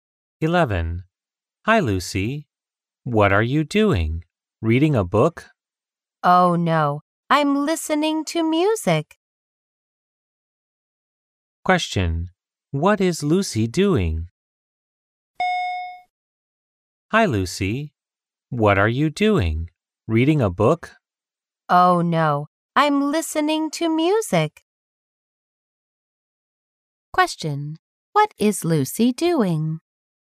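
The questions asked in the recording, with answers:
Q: What is Lucy doing?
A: Listening to music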